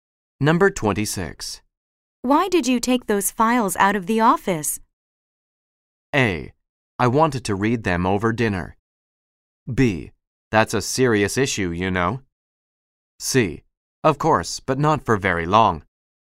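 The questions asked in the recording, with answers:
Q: Why did you take those files out of the office?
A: A: I wanted to read them over dinner.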